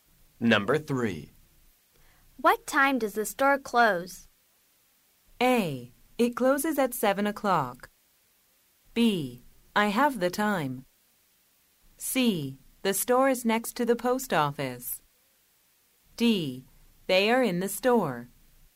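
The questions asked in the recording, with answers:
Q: What time does the store close?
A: A: It closes at 7 o'clock.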